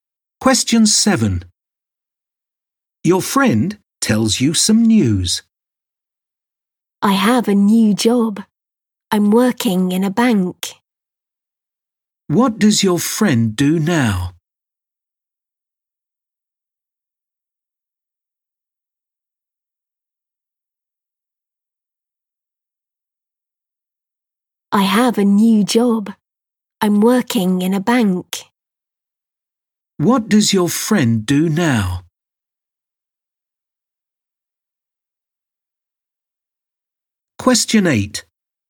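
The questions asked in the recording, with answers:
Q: What does your friend do now?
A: Works in a bank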